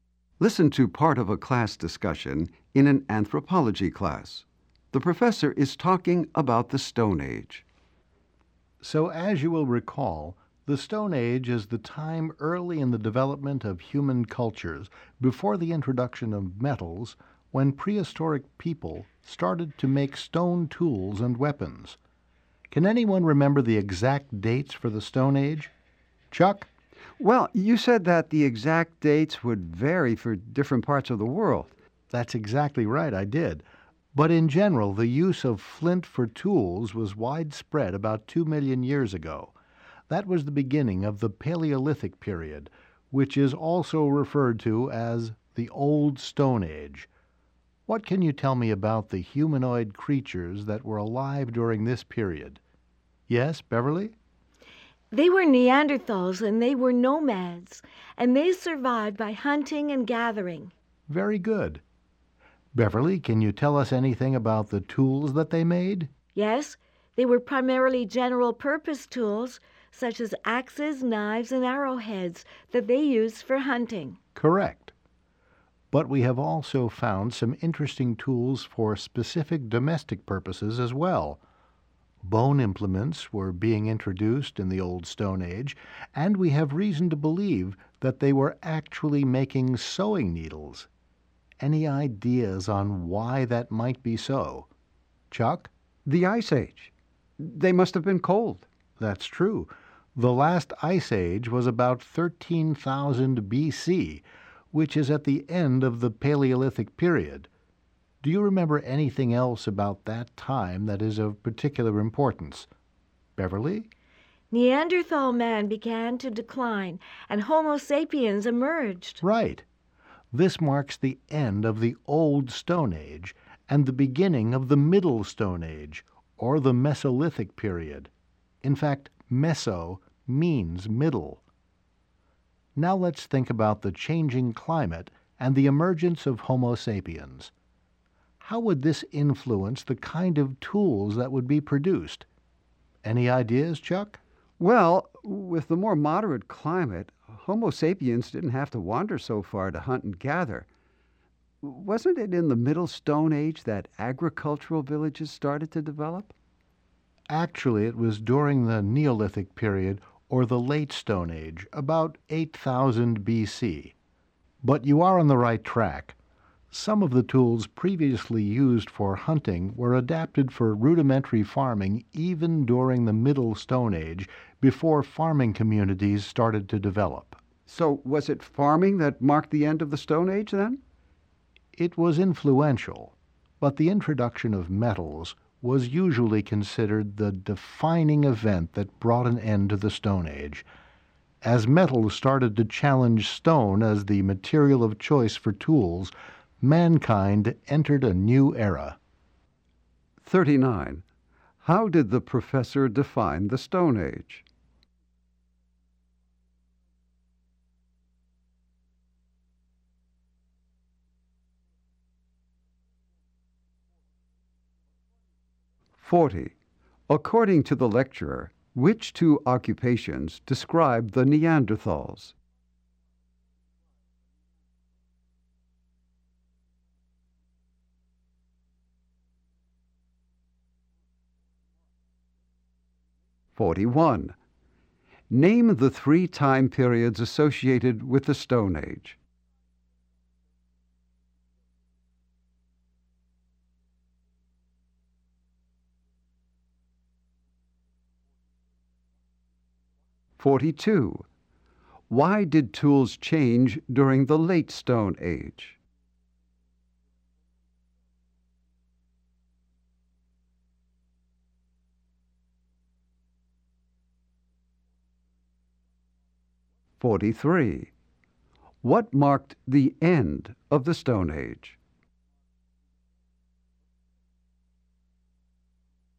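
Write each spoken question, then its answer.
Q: How did the professor define the Stone Age?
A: The time before metals when people made stone tools and weapons.

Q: According to the lecturer, which two occupations describe the Neanderthals?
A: Hunting and gathering

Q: Name the three time periods associated with the Stone Age.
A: Paleolithic, Mesolithic, Neolithic

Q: What marked the end of the Stone Age?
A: The introduction of metals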